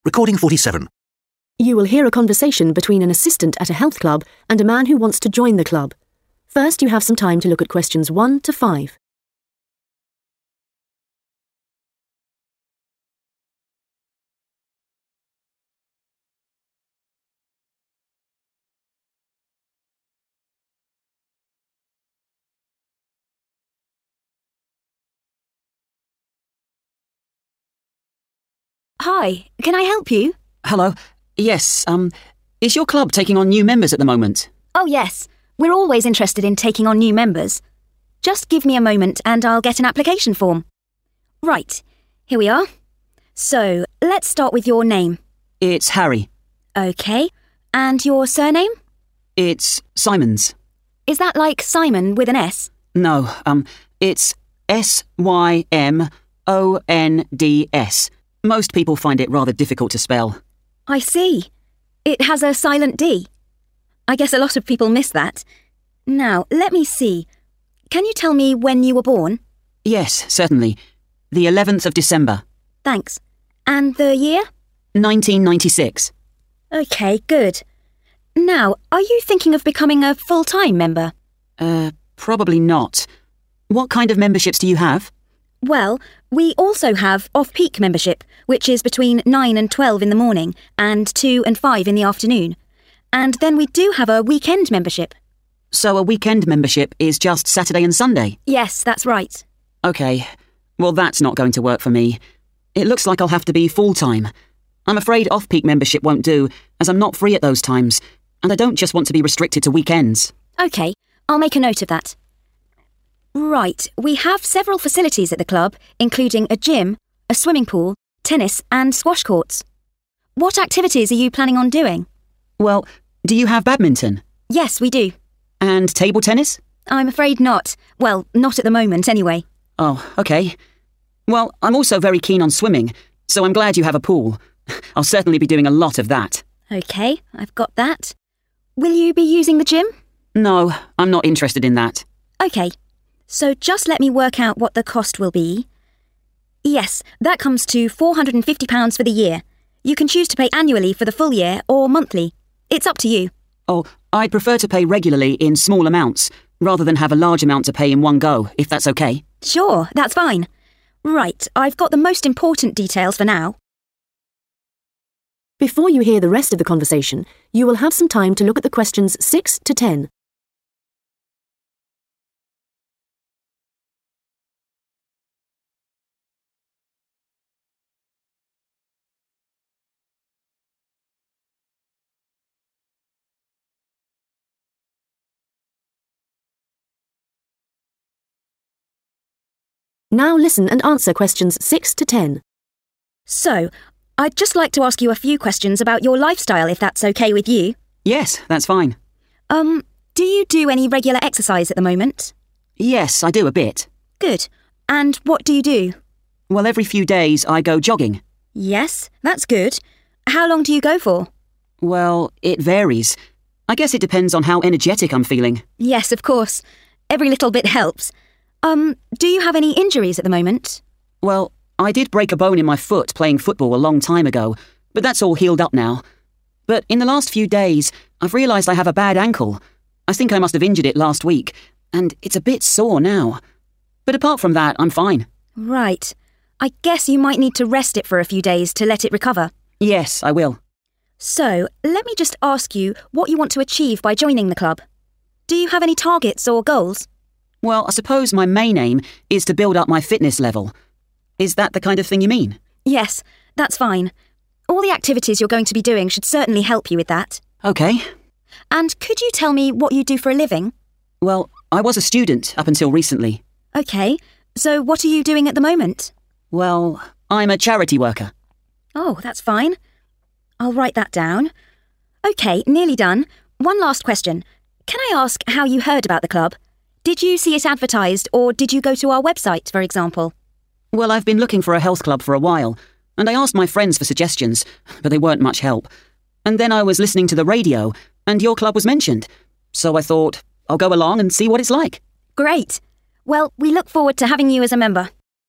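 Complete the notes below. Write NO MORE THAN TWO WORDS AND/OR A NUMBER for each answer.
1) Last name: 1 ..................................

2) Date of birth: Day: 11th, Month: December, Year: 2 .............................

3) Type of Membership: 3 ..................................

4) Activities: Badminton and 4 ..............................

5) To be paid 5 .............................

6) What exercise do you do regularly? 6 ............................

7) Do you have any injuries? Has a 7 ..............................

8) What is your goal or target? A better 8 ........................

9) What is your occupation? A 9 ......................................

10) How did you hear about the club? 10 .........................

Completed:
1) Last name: Symonds
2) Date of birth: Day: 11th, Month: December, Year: 1996
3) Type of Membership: full-time
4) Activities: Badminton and swimming
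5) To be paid monthly
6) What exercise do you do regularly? jogging
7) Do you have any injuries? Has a bad ankle
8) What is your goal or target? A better fitness level
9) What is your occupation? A charity worker
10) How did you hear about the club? radio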